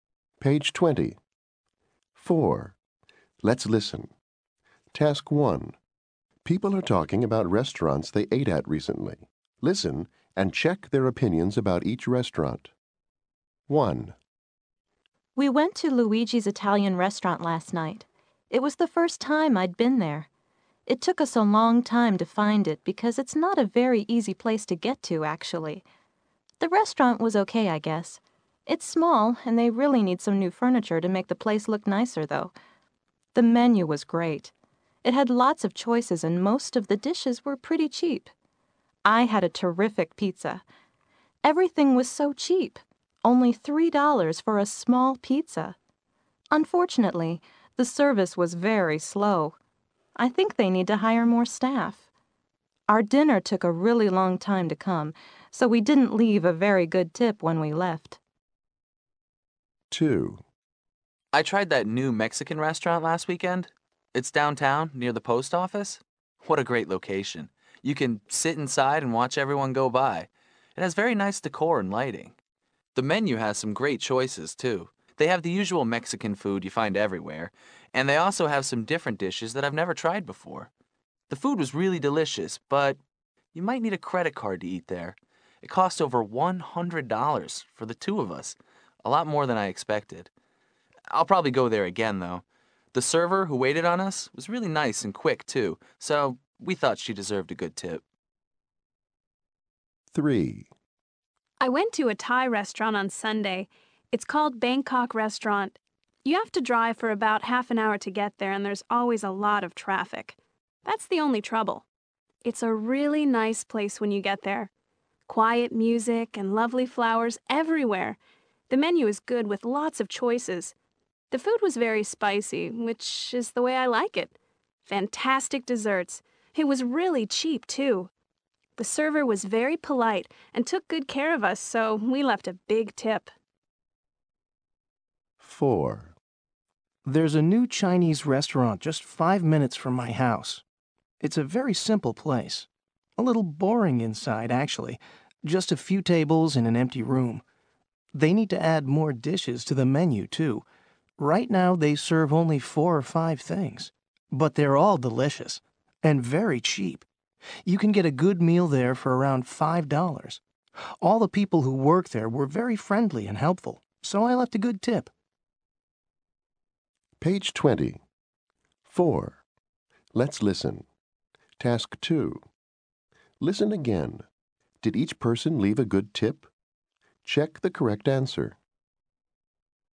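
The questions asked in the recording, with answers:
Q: Did each person leave a good tip?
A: No

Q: Did each person leave a good tip?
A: Yes

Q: Did each person leave a good tip?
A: Yes

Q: Did each person leave a good tip?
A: Yes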